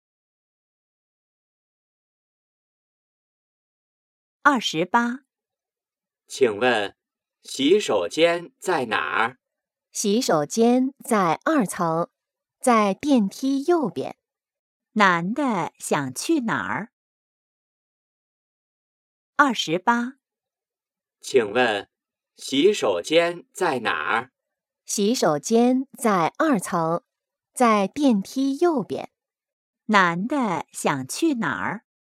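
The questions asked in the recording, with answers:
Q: 男的想去哪儿?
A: 洗手间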